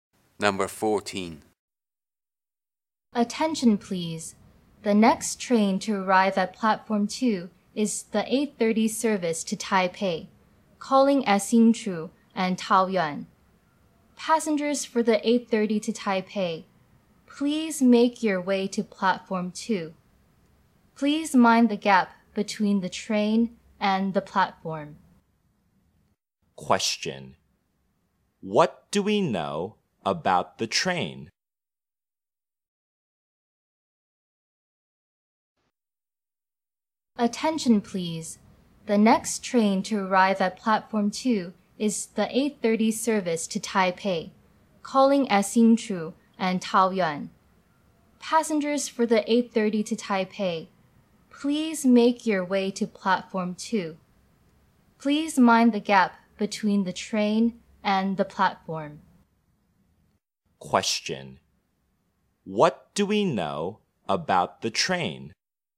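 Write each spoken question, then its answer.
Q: Question. What do we know about the train?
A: It is the 8:30 train to Taipei at Platform 2, stopping at Hsinchu and Taoyuan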